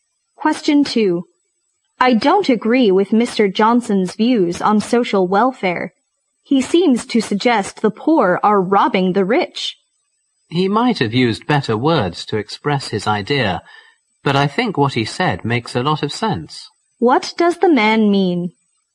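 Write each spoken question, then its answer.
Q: What does the man mean?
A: He thinks Mr. Johnson's views make sense, though his wording could be better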